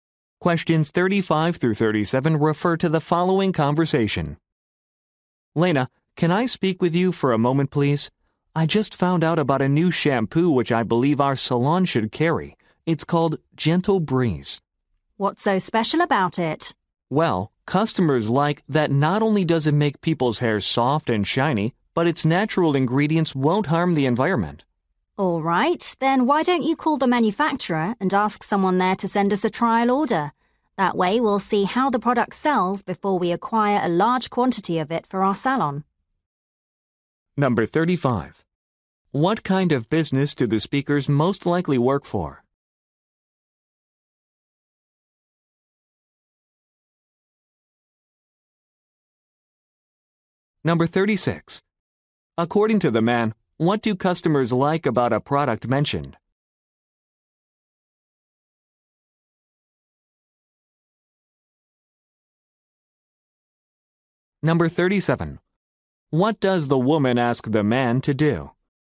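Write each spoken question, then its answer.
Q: What kind of business do the speakers most likely work for?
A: A hair salon

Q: According to the man, what do customers like about a product mentioned?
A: Its natural ingredients won't harm the environment

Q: What does the woman ask the man to do?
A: Call the manufacturer to request a trial order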